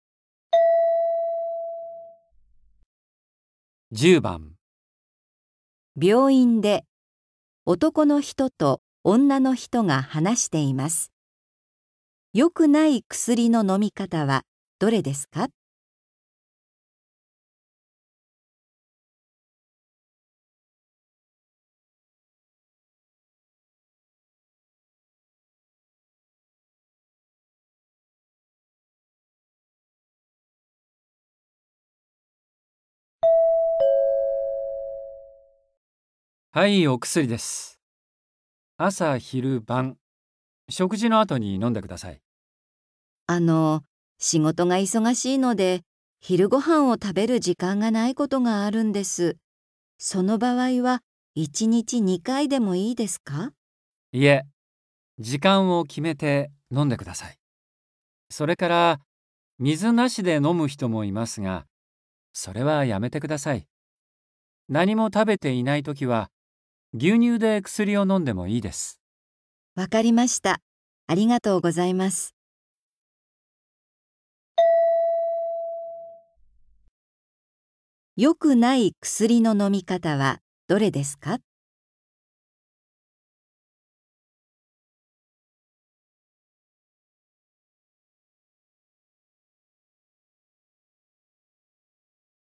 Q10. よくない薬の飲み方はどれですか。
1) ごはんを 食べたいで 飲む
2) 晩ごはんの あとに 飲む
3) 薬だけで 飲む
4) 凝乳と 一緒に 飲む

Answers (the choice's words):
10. 薬だけで 飲む

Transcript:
M:はい、お薬です。朝昼晩、食事の後に飲んでください。
F:あの、仕事が忙しいので、昼ご飯を食べる時間がないことがあるんです。その場合は1日2回でもいいですか。
M:いえ。時間を決めて、飲んでください。それから、水なしで飲む人もいますが、それはやめてください。何も食べていないときは、牛乳で薬を飲んでもいいです。
F:わかりました。ありがとうございます。

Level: N4